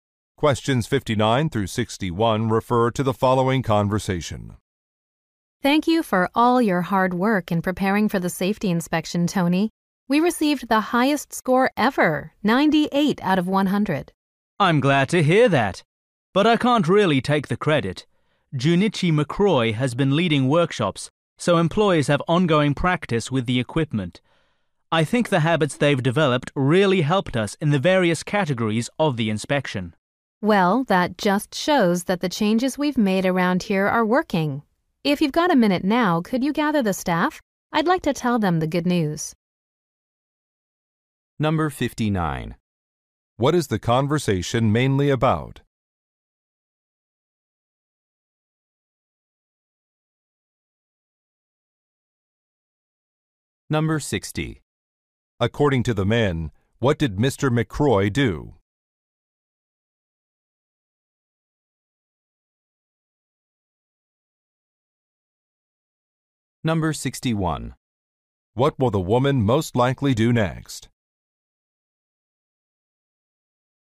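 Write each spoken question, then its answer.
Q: What is the conversation mainly about?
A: Safety inspection results

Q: McCroy do?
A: Led workshops

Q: What will the woman most likely do next?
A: Tell the staff the good news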